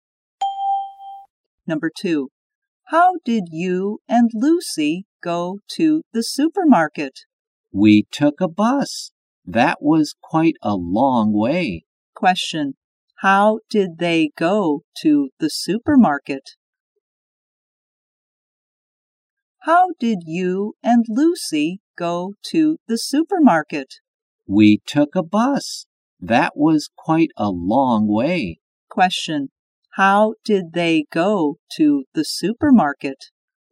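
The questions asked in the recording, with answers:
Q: Question, how did they go to the supermarket?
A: By bus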